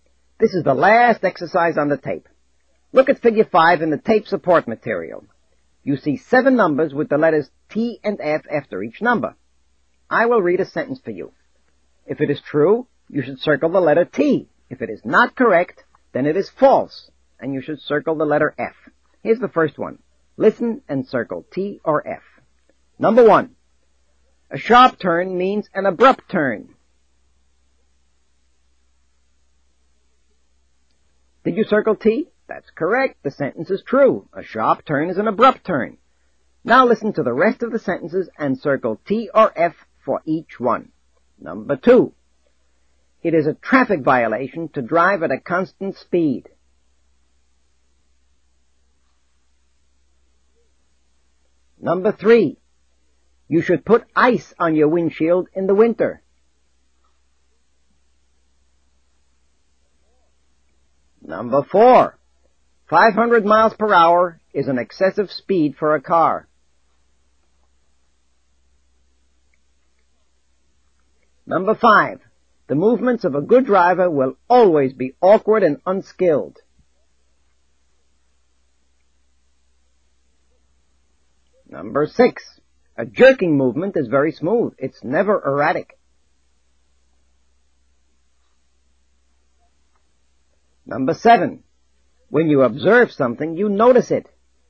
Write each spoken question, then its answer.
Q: It is a traffic violation to drive at a constant speed.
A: Number 2 is false, F.

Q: You should put ice on your windshield in the winter.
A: Number 3 is false, F.

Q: 500 miles per hour is an excessive speed for a car.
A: Number 4 is true, T.

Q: The movements of a good driver will always be awkward and unskilled.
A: Number 5 is false, F.

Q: A jerking movement is very smooth.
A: Number 6 is also false, F.

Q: When you observe something, you notice it.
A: And number 7 is true, T.